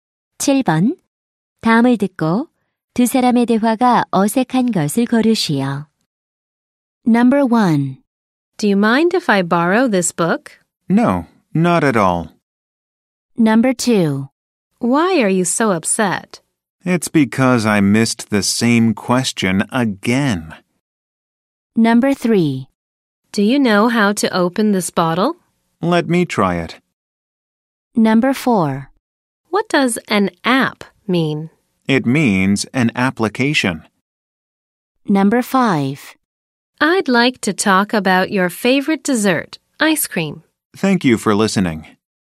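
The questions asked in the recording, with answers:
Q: 다음을 듣고 두 사람의 대화가 어색한 것을 고르시오.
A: 5: I'd like to talk about your favorite dessert, ice cream. / Thank you for listening.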